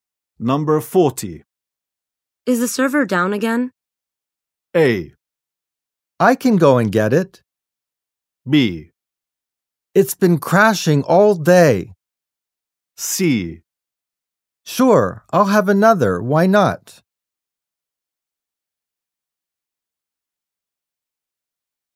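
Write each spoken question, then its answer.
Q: Is the server down again?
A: B: It's been crashing all day.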